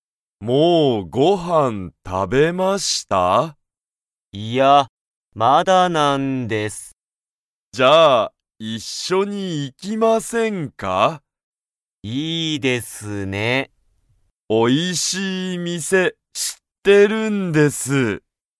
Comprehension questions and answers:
武田(たけだ)さんと佐藤(さとう)さんは、一緒(いっしょ)にご飯(はん)を食(た)べますか?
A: はい

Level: Level 1